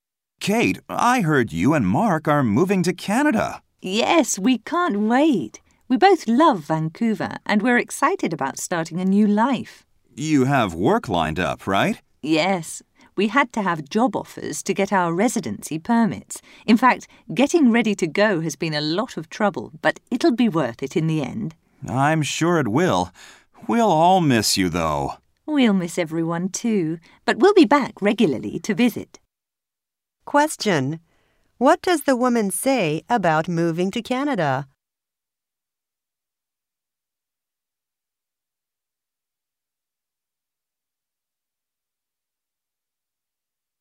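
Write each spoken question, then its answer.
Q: What does the woman say about moving to Canada?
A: Getting ready has been a lot of trouble, but it will be worth it.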